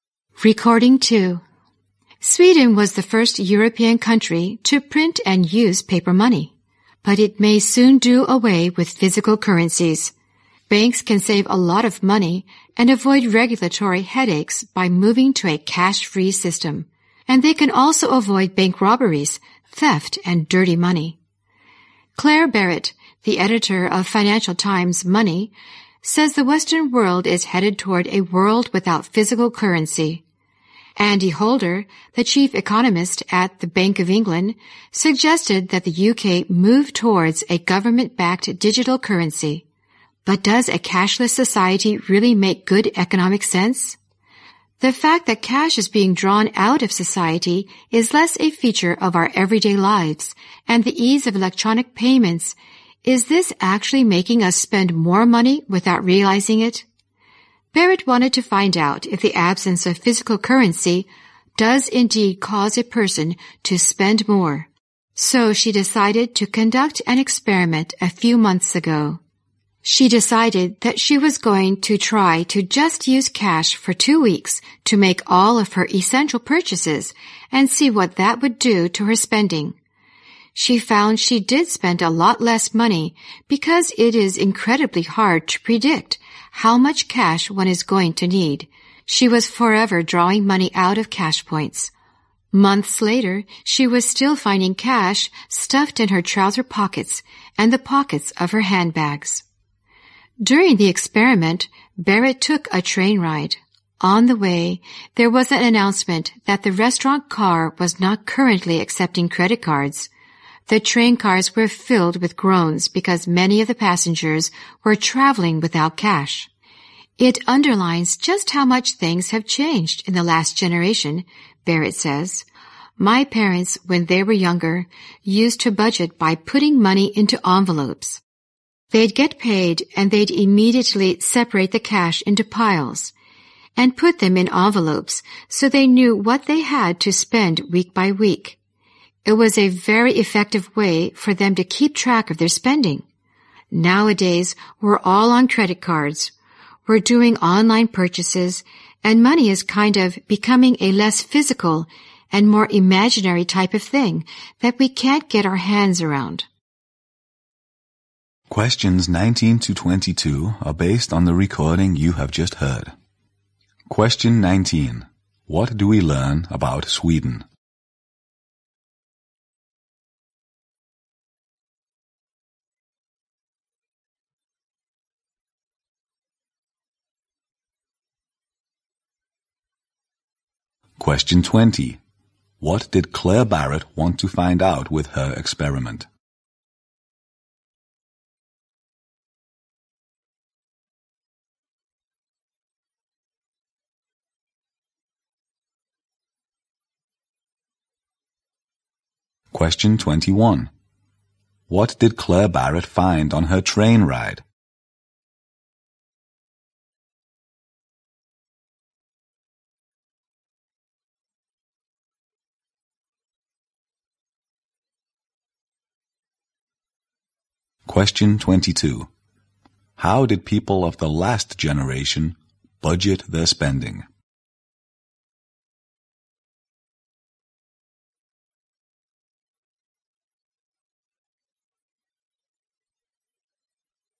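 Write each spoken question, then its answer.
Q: What do we learn about Sweden?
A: It was the first European country to print and use paper money and may soon go cash-free

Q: What did Claire Barrett want to find out with her experiment?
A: Whether the absence of physical currency causes a person to spend more

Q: What did Claire Barrett find on her train ride?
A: Many passengers were traveling without cash

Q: How did people of the last generation budget their spending?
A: By separating cash into envelopes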